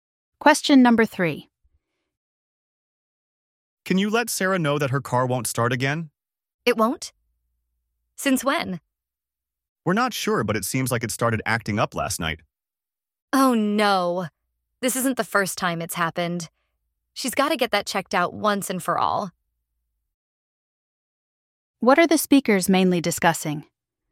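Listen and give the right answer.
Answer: Sarah's car won't start again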